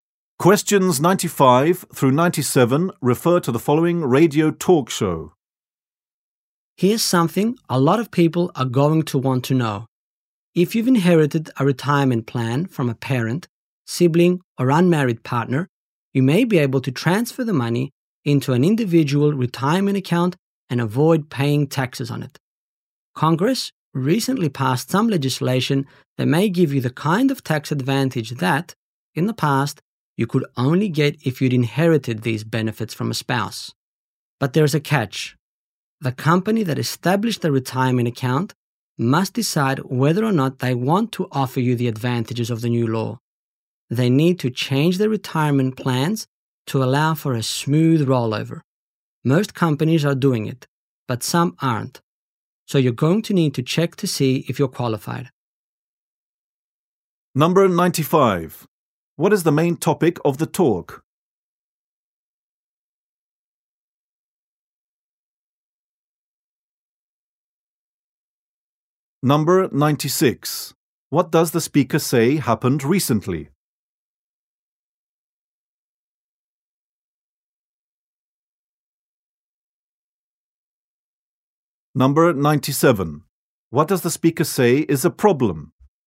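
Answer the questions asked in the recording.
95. Avoiding taxes on inherited retirement plans
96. Congress passed new legislation.
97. Some companies may not change their plans to allow the rollover.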